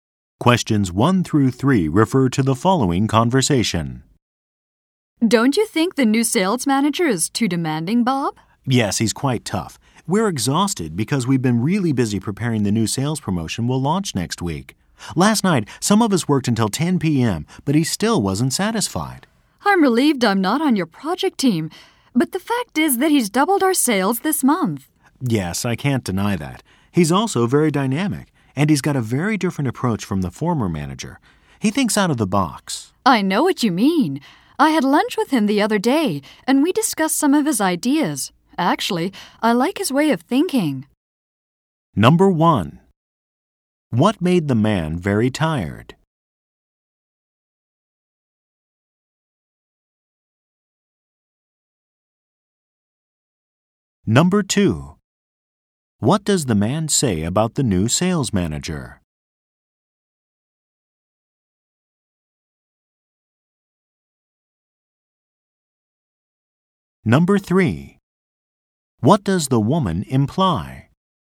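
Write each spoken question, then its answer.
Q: What made the man very tired?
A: Preparing the new sales promotion and working late

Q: What does the man say about the new sales manager?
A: He is tough but dynamic and thinks out of the box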